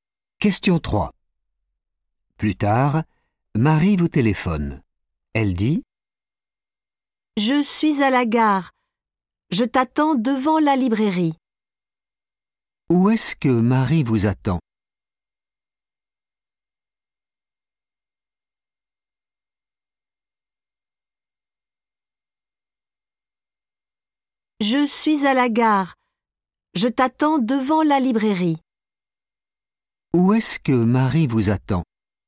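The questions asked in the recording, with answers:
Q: Où est-ce que Marie vous attend ?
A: devant la librairie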